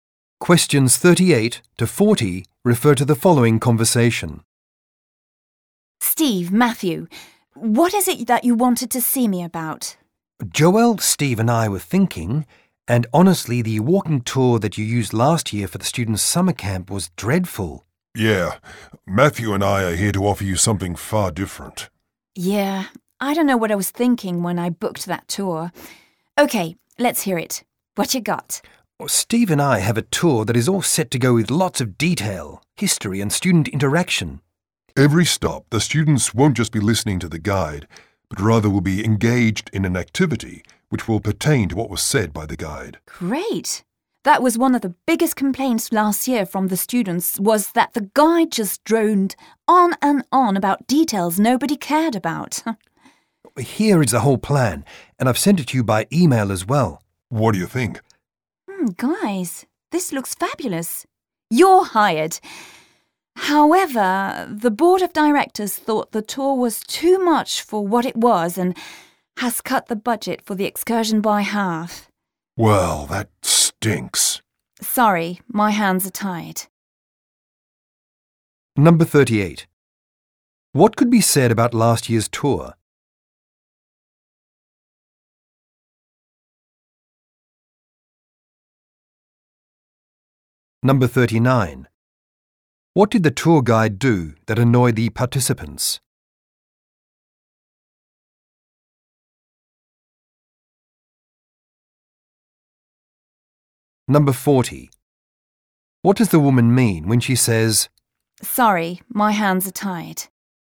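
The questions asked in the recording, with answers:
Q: What could be said about last year's tour?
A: It was dreadful

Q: What did the tour guide do that annoyed the participants?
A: Droned on about details nobody cared about

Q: What does the woman mean when she says, "Sorry, my hands are tied"?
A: She can't do anything about the budget cut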